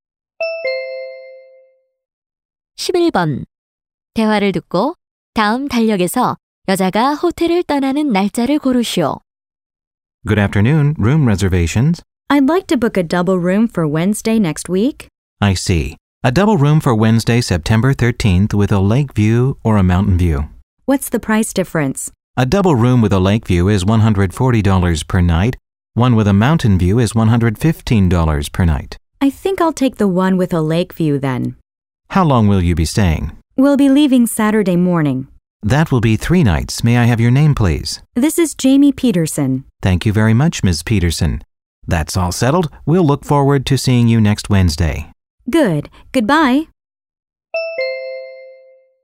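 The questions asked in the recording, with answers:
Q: 대화를 듣고 다음 달력에서 여자가 호텔을 떠나는 날짜를 고르시오.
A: 9월 16일 토요일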